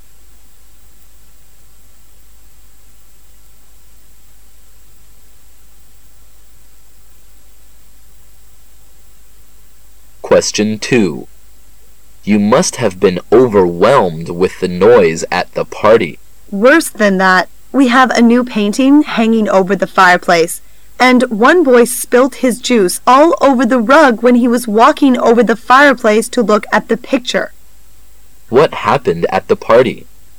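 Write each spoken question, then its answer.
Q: What happened at the party?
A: A boy spilt his juice all over the rug.

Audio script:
Q:What does the woman mean?
[解析] M:You must have been overwhelmed with the noise at the party. W:Worse than that.We have a new painting hanging over the fireplace,and one boy spilt his juice all over the rug when he was walking over the fireplace to look at the picture. Q:What happened at the party?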